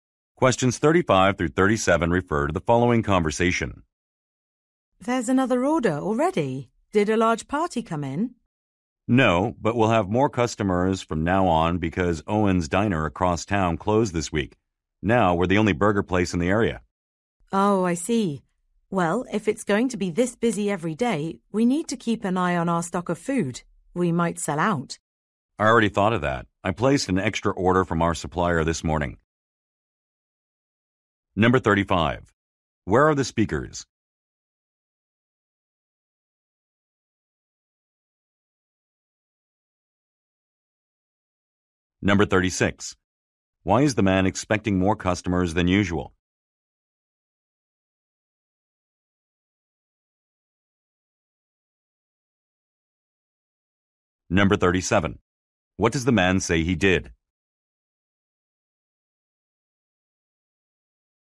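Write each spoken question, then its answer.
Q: Where are the speakers?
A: At a burger restaurant.

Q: Why is the man expecting more customers than usual?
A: A competing diner across town closed.

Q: What does the man say he did?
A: He placed an extra order from the supplier.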